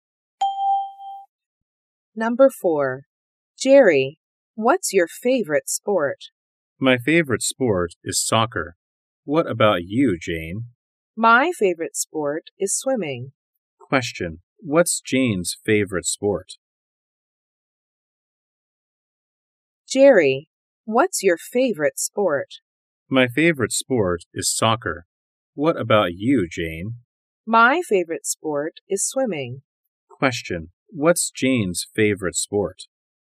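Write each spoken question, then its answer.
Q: What's Jane's favorite sport?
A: Swimming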